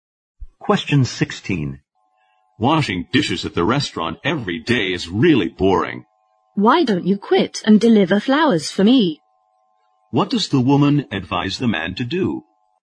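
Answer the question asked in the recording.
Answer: Quit his dishwashing job and deliver flowers for her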